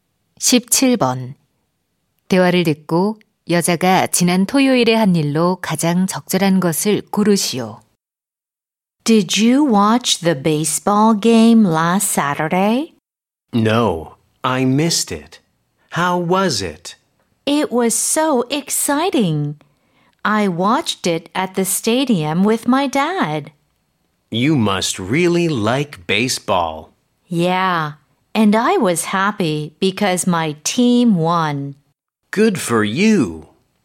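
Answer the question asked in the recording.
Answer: 경기장에서 아빠와 야구 경기 관람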